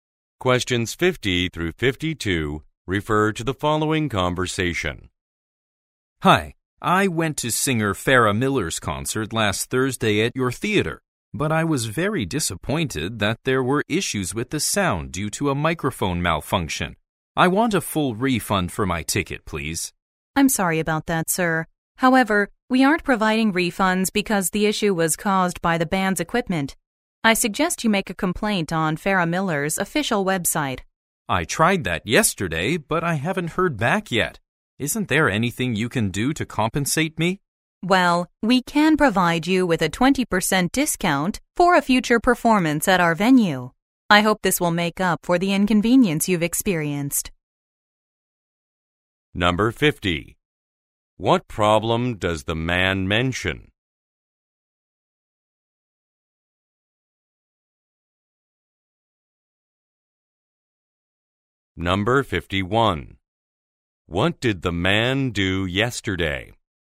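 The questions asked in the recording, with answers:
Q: What problem does the man mention?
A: There were sound problems at the concert because a microphone malfunctioned

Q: What did the man do yesterday?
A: He made a complaint on Farrah Miller's official website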